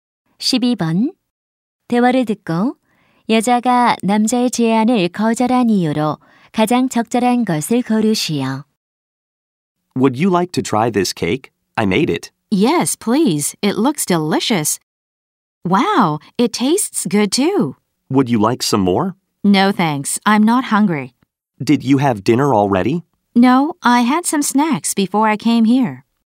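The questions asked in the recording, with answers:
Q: 대화를 듣고 여자가 남자의 제안을 거절한 이유로 가장 적절한 것을 고르시오.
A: 오기 전에 간식을 먹어서 배가 고프지 않아서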